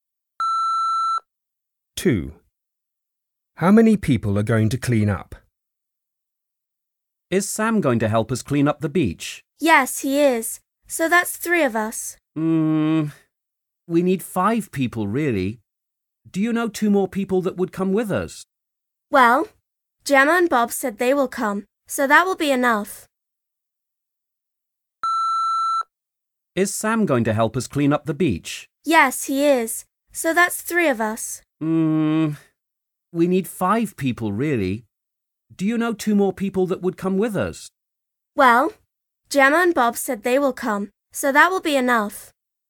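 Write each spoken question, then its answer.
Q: How many people are going to clean up?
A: five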